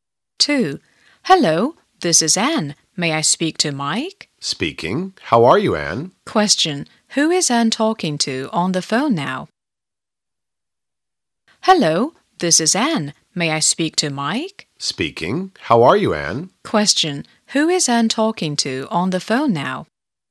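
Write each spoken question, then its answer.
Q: Who is Anne talking to on the phone now?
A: Mike.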